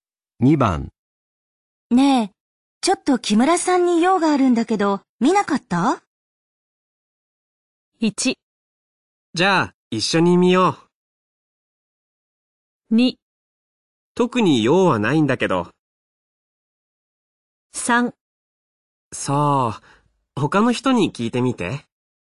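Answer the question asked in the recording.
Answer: 3: そう、他の人に聞いてみて。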